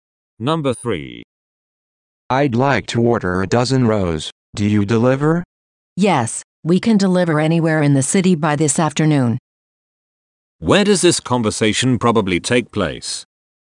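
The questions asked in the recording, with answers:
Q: Where does this conversation probably take place?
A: At a bakery.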